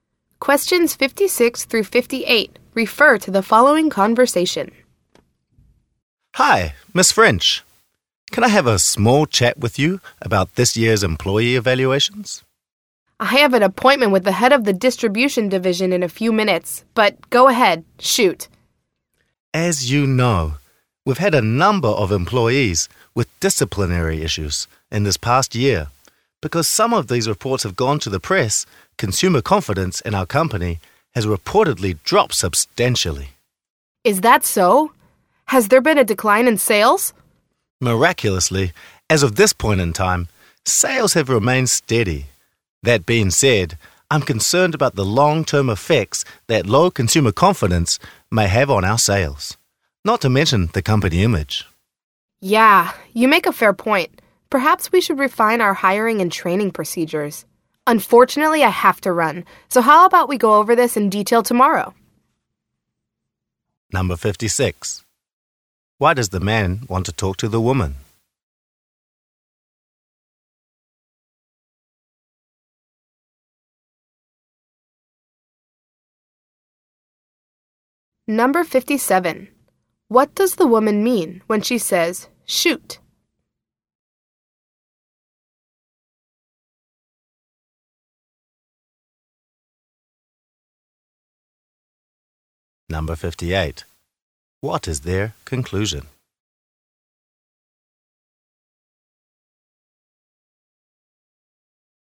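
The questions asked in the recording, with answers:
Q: Why does the man want to talk to the woman?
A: To discuss employee evaluations and disciplinary issues that are hurting consumer confidence

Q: What does the woman mean when she says, "Shoot"?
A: Go ahead and speak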